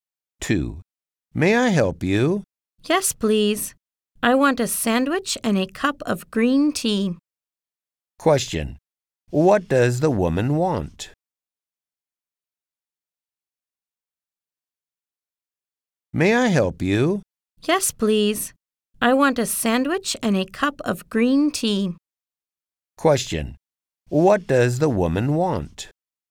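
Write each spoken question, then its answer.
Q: What does the woman want?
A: A sandwich and a cup of green tea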